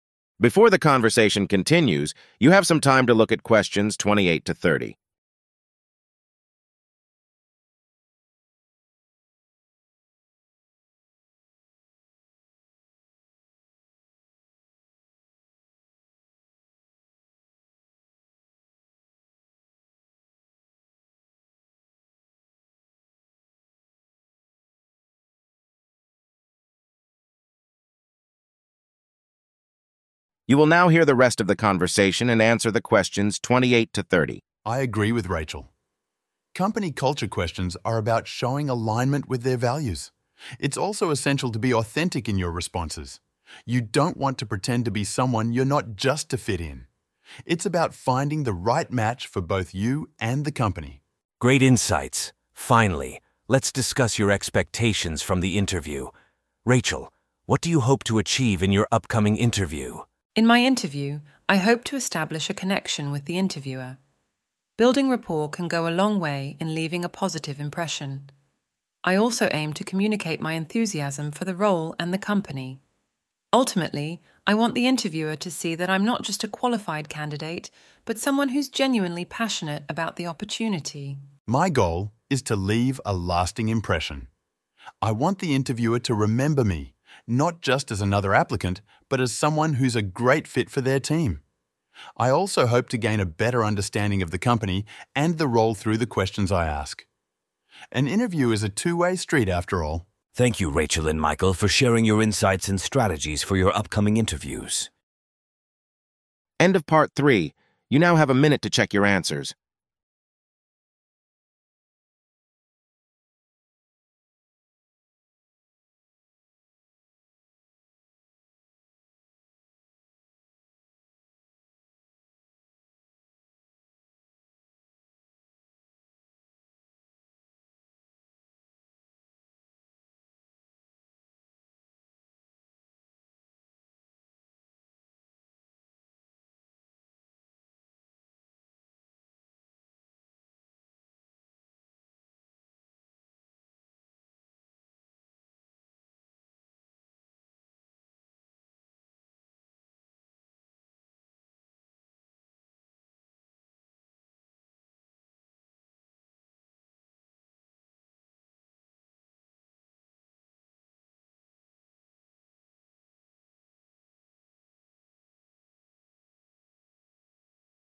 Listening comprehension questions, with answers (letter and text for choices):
Choose the correct option (A, B, or C) for each of the following questions based on the provided script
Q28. What does Rachel hope to achieve in her upcoming interview?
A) Leaving a lasting impression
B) Gaining a better understanding of the company culture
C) Establishing a connection with the interviewer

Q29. What is Michael's primary goal in the interview?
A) To gain a better understanding of the company and role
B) To have a generic interview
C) To leave a lasting impression and be a great fit for the team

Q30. According to the script, an interview is described as a:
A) One-sided conversation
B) Two-way street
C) Stressful experience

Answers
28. C) Establishing a connection with the interviewer
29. C) To leave a lasting impression and be a great fit for the team
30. B) Two-way street

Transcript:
Now, let's discuss questions that evaluate your fit with the company culture. Rachel, how do you prepare for these questions?
Rachel: Understanding the company's culture is key here, Professor. I read about their values and try to connect them to my own values and experiences. I want the interviewer to see that I not only have the skills they're looking for but also that I'll be a good fit with the team and their culture.
Michael: I agree with Rachel. Company culture questions are about showing alignment with their values. It's also essential to be authentic in your responses. You don't want to pretend to be someone you're not just to fit in. It's about finding the right match for both you and the company.
Professor: Great insights. Finally, let's discuss your expectations from the interview. Rachel, what do you hope to achieve in your upcoming interview?
Rachel: In my interview, I hope to establish a connection with the interviewer. Building rapport can go a long way in leaving a positive impression. I also aim to communicate my enthusiasm for the role and the company. Ultimately, I want the interviewer to see that I'm not just a qualified candidate but someone who's genuinely passionate about the opportunity.
Michael: My goal is to leave a lasting impression. I want the interviewer to remember me, not just as another applicant but as someone who's a great fit for their team. I also hope to gain a better understanding of the company and the role through the questions I ask. An interview is a two-way street, after all.
Professor: Thank you, Rachel and Michael, for sharing your insights and strategies for your upcoming interviews.